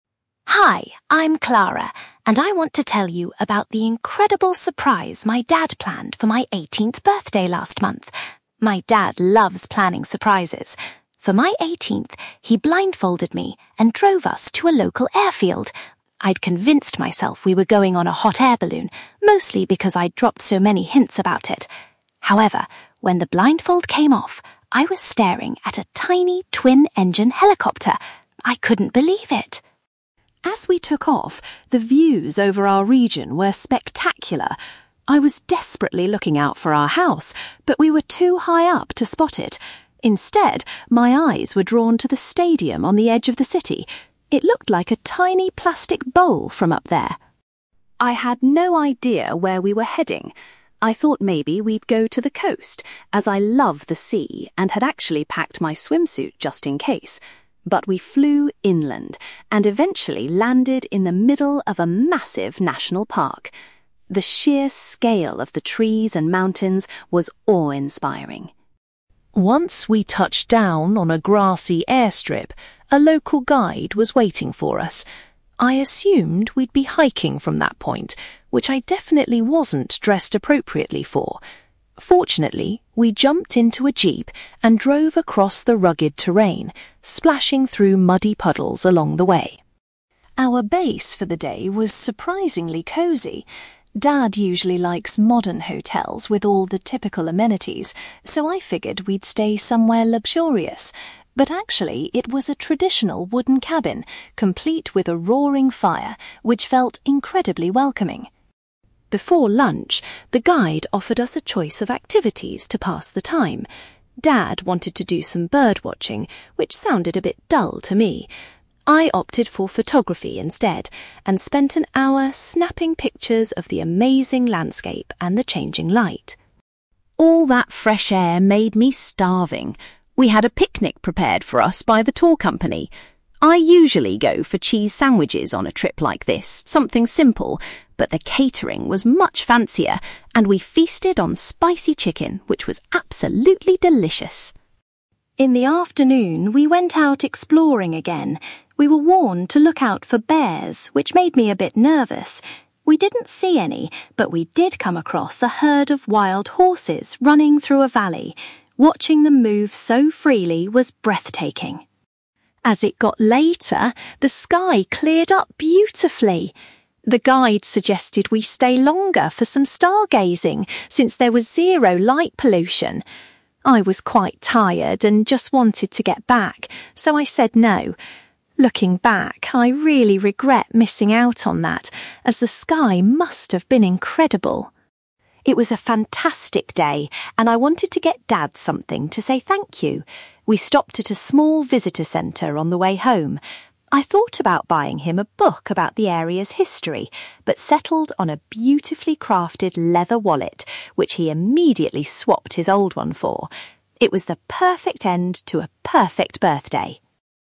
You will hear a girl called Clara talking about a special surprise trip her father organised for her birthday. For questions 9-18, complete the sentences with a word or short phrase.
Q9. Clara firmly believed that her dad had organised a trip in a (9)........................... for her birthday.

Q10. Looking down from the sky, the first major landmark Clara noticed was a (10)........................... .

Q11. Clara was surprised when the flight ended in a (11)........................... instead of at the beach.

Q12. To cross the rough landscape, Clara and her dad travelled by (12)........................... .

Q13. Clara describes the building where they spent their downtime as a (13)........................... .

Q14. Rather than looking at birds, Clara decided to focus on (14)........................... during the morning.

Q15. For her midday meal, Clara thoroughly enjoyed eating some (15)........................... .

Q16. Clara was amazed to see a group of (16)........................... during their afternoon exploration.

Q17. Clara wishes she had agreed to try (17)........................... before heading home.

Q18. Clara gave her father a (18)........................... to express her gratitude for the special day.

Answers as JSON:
{"9": "hot-air balloon", "10": "stadium", "11": "national park", "12": "jeep", "13": "wooden cabin", "14": "photography", "15": "spicy chicken", "16": "wild horses", "17": "stargazing", "18": "leather wallet"}

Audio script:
Clara: Hi, I'm Clara, and I want to tell you about the incredible surprise my dad planned for my eighteenth birthday last month. My dad loves planning surprises. For my 18th, he blindfolded me and drove us to a local airfield. I'd convinced myself we were going on a hot-air balloon, mostly because I'd dropped so many hints about it! However, when the blindfold came off, I was staring at a tiny, twin-engine helicopter. I couldn't believe it!
As we took off, the views over our region were spectacular. I was desperately looking out for our house, but we were too high up to spot it. Instead, my eyes were drawn to the stadium on the edge of the city. It looked like a tiny plastic bowl from up there!
I had no idea where we were heading. I thought maybe we'd go to the coast, as I love the sea and had actually packed my swimsuit just in case. But we flew inland, and eventually landed in the middle of a massive national park. The sheer scale of the trees and mountains was awe-inspiring.
Once we touched down on a grassy airstrip, a local guide was waiting for us. I assumed we'd be hiking from that point, which I definitely wasn't dressed appropriately for! Fortunately, we jumped into a jeep and drove across the rugged terrain, splashing through muddy puddles along the way.
Our base for the day was surprisingly cozy. Dad usually likes modern hotels with all the typical amenities, so I figured we'd stay somewhere luxurious. But actually, it was a traditional wooden cabin, complete with a roaring fire, which felt incredibly welcoming.
Before lunch, the guide offered us a choice of activities to pass the time. Dad wanted to do some bird-watching, which sounded a bit dull to me. I opted for photography instead, and spent an hour snapping pictures of the amazing landscape and the changing light.
All that fresh air made me starving. We had a picnic prepared for us by the tour company. I usually go for cheese sandwiches on a trip like this—something simple—but the catering was much fancier, and we feasted on spicy chicken which was absolutely delicious.
In the afternoon, we went out exploring again. We were warned to look out for bears, which made me a bit nervous! We didn't see any, but we did come across a herd of wild horses running through a valley. Watching them move so freely was breathtaking.
As it got later, the sky cleared up beautifully. The guide suggested we stay longer for some stargazing, since there was zero light pollution. I was quite tired and just wanted to get back, so I said no. Looking back, I really regret missing out on that, as the sky must have been incredible.
It was a fantastic day, and I wanted to get Dad something to say thank you. We stopped at a small visitor centre on the way home. I thought about buying him a book about the area's history, but settled on a beautifully crafted leather wallet, which he immediately swapped his old one for. It was the perfect end to a perfect birthday.

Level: B2